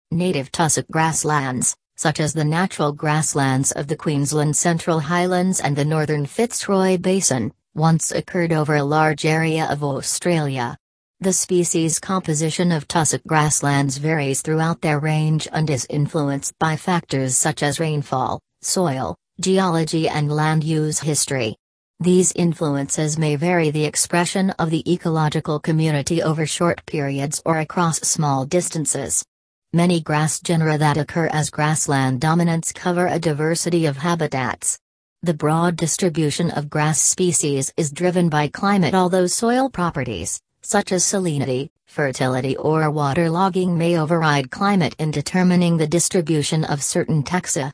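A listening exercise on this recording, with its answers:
Listen the following audio and type missing words in each blank.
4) Native tussock grasslands, such as the Natural grasslands of the Queensland Central Highlands and the _______ Fitzroy Basin, once occurred over a large area of Australia. The species _____ of tussock grasslands varies throughout their range and is influenced by factors such as rainfall, soil, _____ and land use history. These influences may vary the ______ of the ecological community over short periods or across small distances. Many grass genera that occur as grassland ______ cover a diversity of habitats. The broad distribution of grass species is driven by climate although soil properties, such as ______ , fertility or water logging may override climate in determining the distribution of certain taxa.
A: Northern; composition; geology; expression; dominants; salinity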